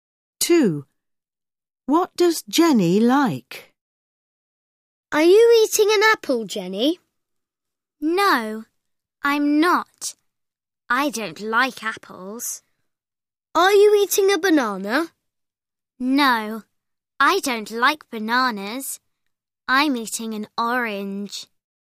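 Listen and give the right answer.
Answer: Oranges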